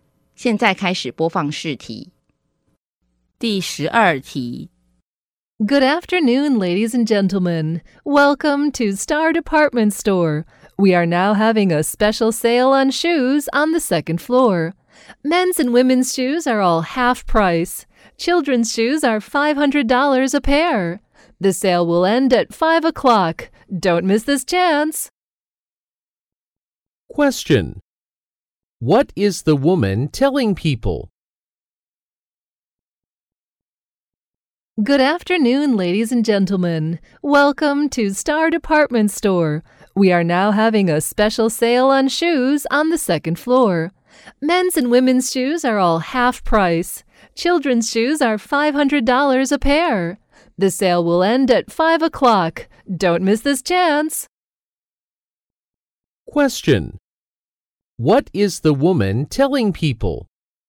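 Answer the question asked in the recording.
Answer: There is a half-price sale on shoes on the second floor until 5 o'clock.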